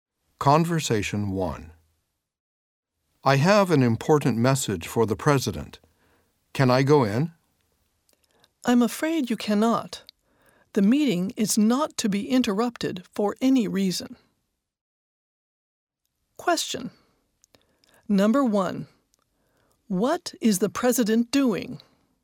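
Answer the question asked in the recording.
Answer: He is in a meeting.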